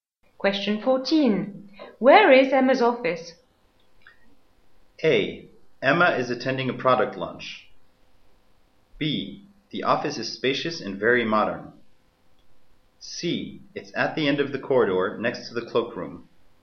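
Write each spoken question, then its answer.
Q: Where is Emma's office?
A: C: It's at the end of the corridor, next to the cloakroom.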